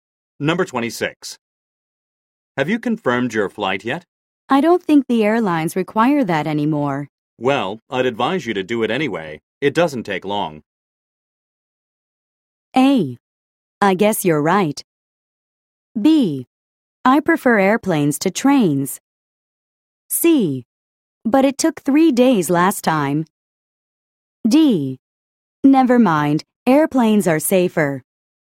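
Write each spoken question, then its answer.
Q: Well, I'd advise you to do it anyway.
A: A: I guess you're right.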